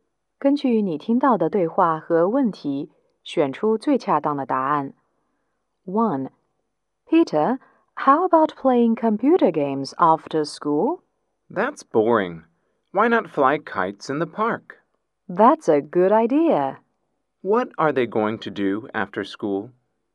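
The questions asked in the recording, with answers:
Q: What are they going to do after school?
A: Fly kites in the park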